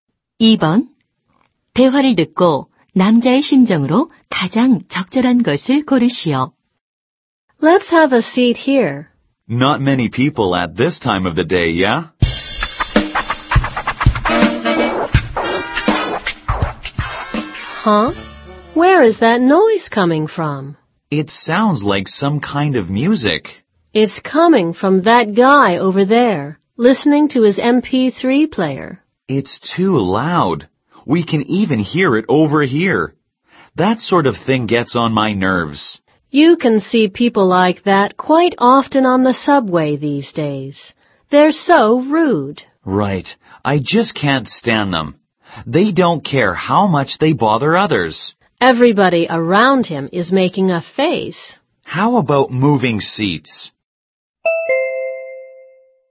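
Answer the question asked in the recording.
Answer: 짜증남 (annoyed)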